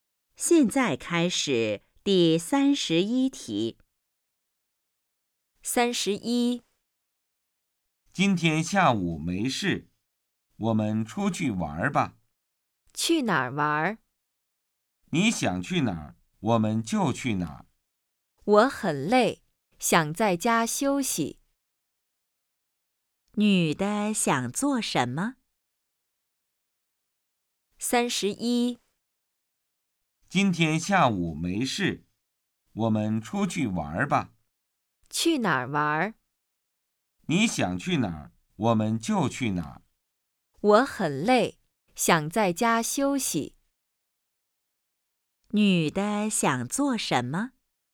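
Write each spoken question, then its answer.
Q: 女的想做什么?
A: 在家休息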